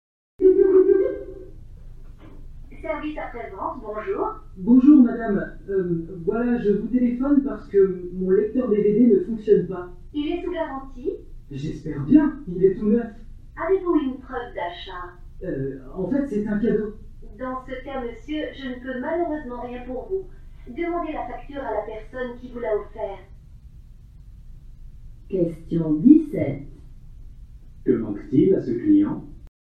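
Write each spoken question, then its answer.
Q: Que manque-t-il à ce client ?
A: Une preuve d'achat (la facture)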